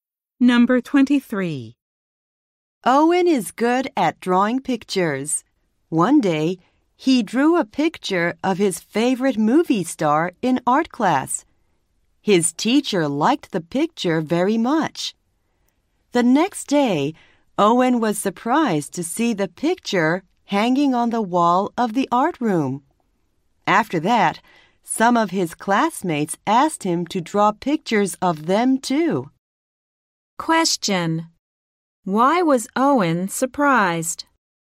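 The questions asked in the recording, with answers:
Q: Why was Owen surprised?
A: His picture was hanging on the art room wall.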